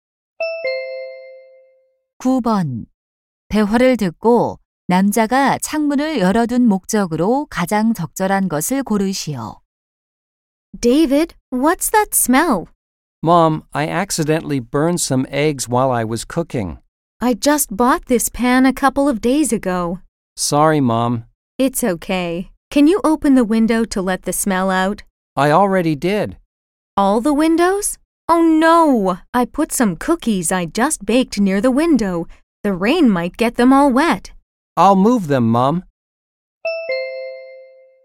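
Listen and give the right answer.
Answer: 탄 냄새를 빼기 위해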